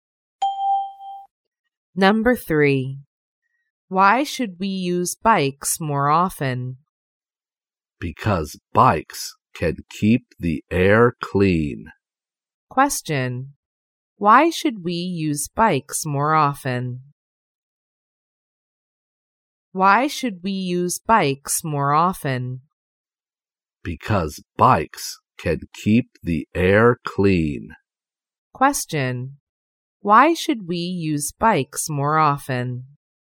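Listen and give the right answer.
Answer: Because bikes can keep the air clean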